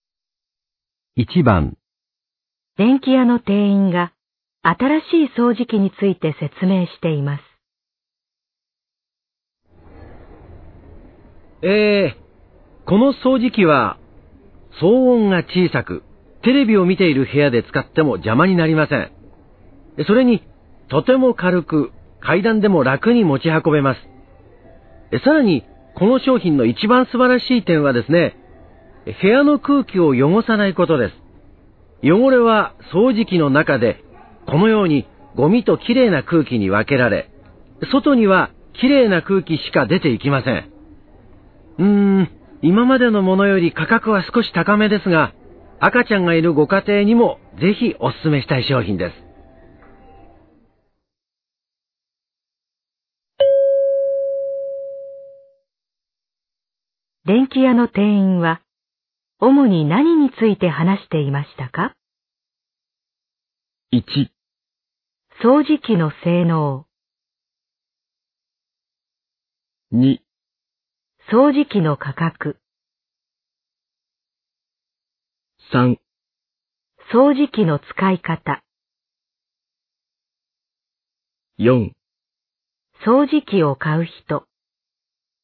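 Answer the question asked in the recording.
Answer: 掃除機の性能

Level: N1级别听力题库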